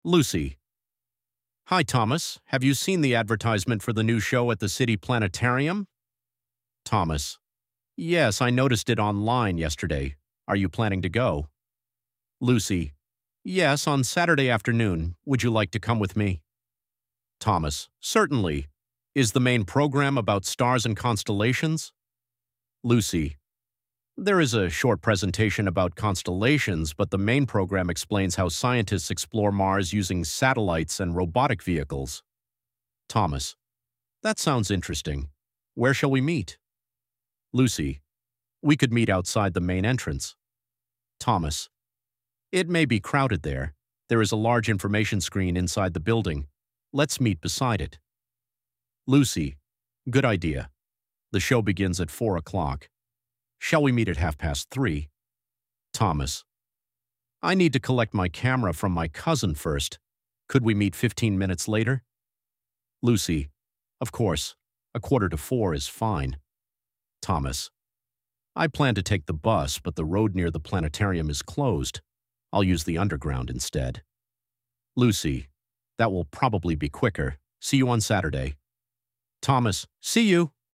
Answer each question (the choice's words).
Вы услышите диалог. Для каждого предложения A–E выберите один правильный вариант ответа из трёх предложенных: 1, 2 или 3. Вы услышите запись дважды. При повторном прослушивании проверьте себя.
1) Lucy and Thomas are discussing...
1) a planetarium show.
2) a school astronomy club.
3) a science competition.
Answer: a planetarium show.

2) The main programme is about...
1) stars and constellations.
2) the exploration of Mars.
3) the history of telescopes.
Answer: the exploration of Mars.

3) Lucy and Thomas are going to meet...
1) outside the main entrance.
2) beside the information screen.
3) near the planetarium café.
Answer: beside the information screen.

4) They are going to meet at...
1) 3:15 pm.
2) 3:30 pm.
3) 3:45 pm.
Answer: 3:45 pm.

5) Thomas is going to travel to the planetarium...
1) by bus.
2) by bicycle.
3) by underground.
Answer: by underground.

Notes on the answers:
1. Люси и Томас обсуждают посещение нового представления в городском планетарии.
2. Основная программа посвящена исследованию Марса при помощи спутников и роботизированных аппаратов. О созвездиях будет только короткая презентация.
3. Сначала Люси предлагает встретиться у главного входа, но окончательно они договариваются встретиться возле информационного экрана внутри здания.
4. Первоначально Люси предлагает встретиться в 3:30. Томас просит перенести встречу на пятнадцать минут, поэтому окончательное время — 3:45.
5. Сначала Томас планировал ехать на автобусе, но из-за закрытой дороги решил воспользоваться метро.

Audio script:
Lucy: Hi Thomas. Have you seen the advertisement for the new show at the city planetarium?
Thomas: Yes, I noticed it online yesterday. Are you planning to go?
Lucy: Yes, on Saturday afternoon. Would you like to come with me?
Thomas: Certainly. Is the main programme about stars and constellations?
Lucy: There is a short presentation about constellations, but the main programme explains how scientists explore Mars using satellites and robotic vehicles.
Thomas: That sounds interesting. Where shall we meet?
Lucy: We could meet outside the main entrance.
Thomas: It may be crowded there. There is a large information screen inside the building. Let's meet beside it.
Lucy: Good idea. The show begins at four o'clock. Shall we meet at half past three?
Thomas: I need to collect my camera from my cousin first. Could we meet fifteen minutes later?
Lucy: Of course. A quarter to four is fine.
Thomas: I planned to take the bus, but the road near the planetarium is closed. I'll use the underground instead.
Lucy: That will probably be quicker. See you on Saturday!
Thomas: See you!

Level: 7 класса